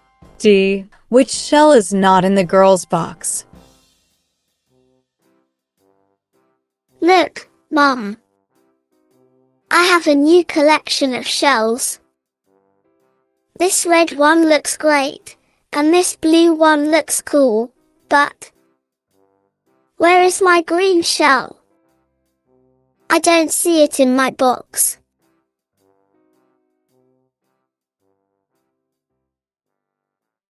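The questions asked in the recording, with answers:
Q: Which shell is not in the girl's box?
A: the green shell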